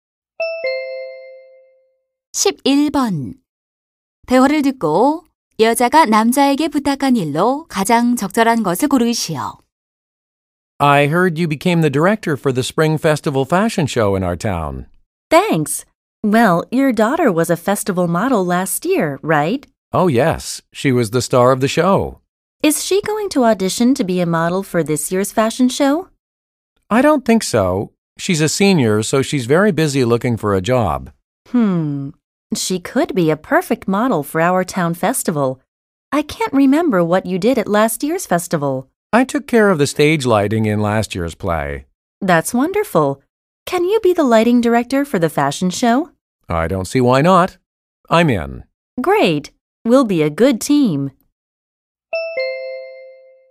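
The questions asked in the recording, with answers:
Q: 대화를 듣고 여자가 남자에게 부탁한 일로 가장 적절한 것을 고르시오.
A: 패션쇼의 조명 감독을 맡아 달라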